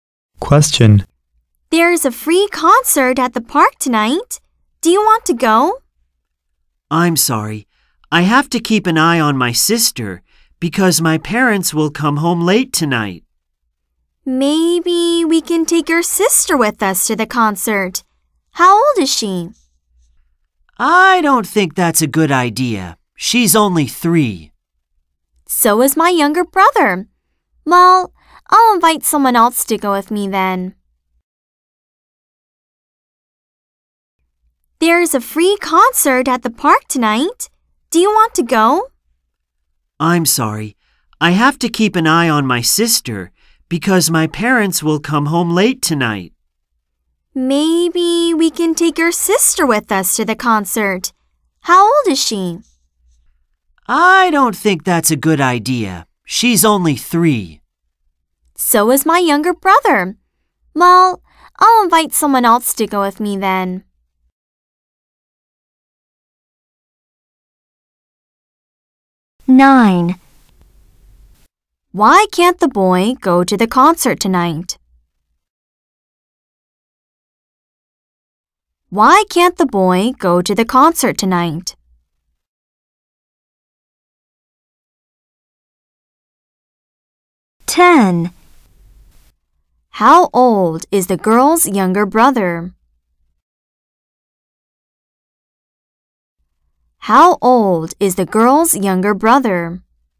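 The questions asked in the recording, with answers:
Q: Why can't the boy go to the concert tonight?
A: He has to keep an eye on his sister because his parents will come home late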